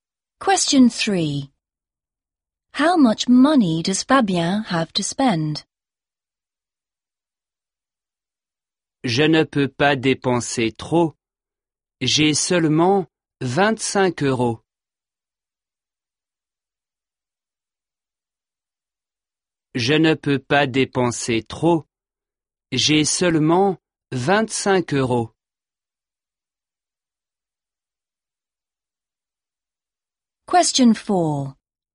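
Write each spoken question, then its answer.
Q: How much money does Fabien have to spend?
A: 25 euros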